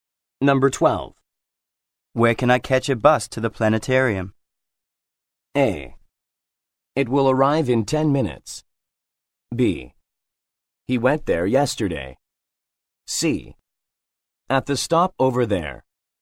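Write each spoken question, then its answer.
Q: Where can I catch a bus to the planetarium?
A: C: At the stop over there.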